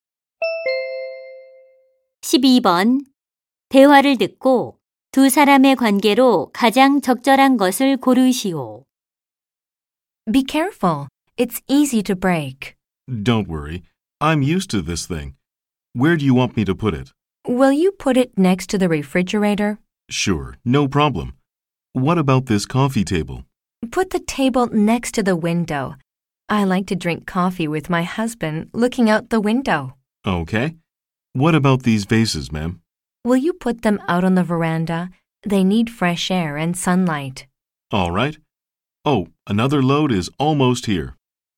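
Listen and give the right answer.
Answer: 이삿짐 운반원과 고객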